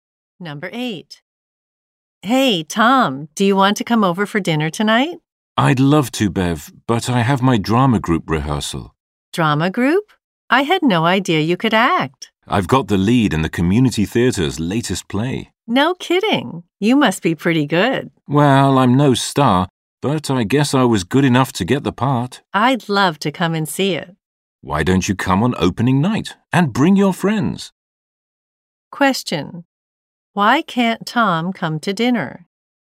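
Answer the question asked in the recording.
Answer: He has a rehearsal with his drama group.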